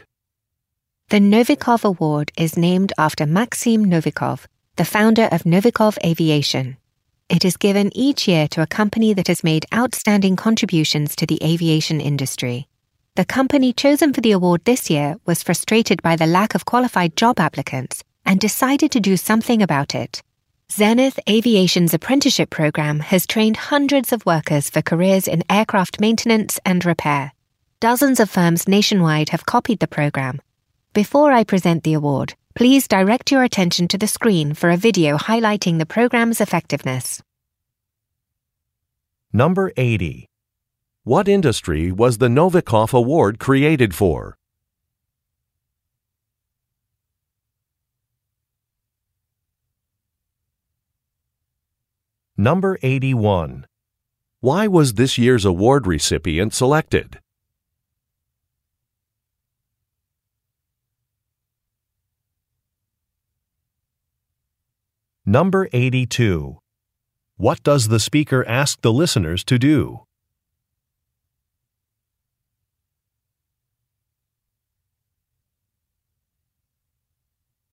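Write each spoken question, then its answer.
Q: What industry was the Novikov Award created for?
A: Aviation

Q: Why was this year's award recipient selected?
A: Its apprenticeship program trained hundreds of workers for aircraft maintenance and repair careers

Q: What does the speaker ask the listeners to do?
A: Watch a video on the screen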